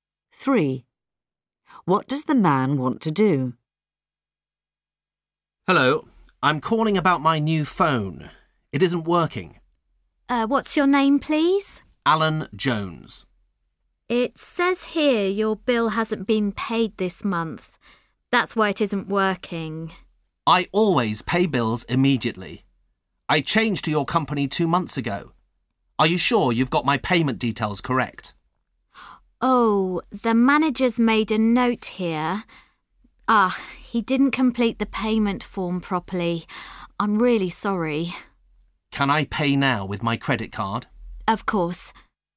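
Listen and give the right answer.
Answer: Pay his bill by credit card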